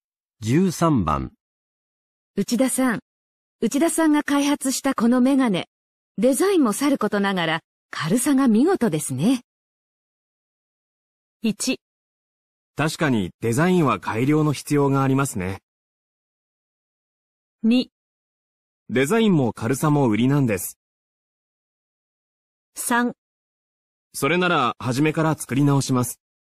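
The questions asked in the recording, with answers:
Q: 内田さんが開発したこのメガネ、デザインもさることながら軽さが見事ですね。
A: 2: デザインも軽さも売りなんです。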